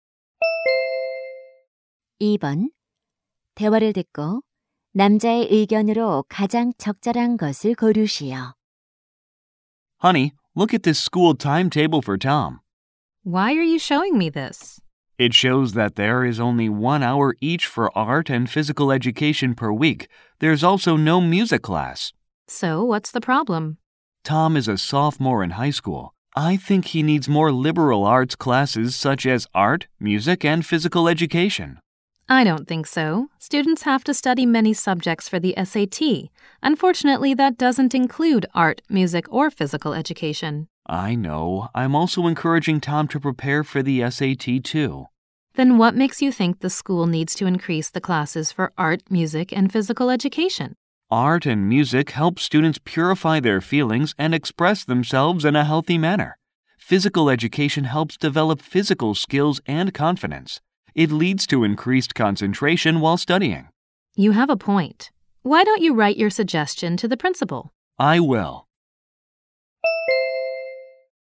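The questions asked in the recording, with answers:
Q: 대화를 듣고 남자의 의견으로 가장 적절한 것을 고르시오.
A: 고등학교에서 미술, 음악, 체육 수업을 늘려야 한다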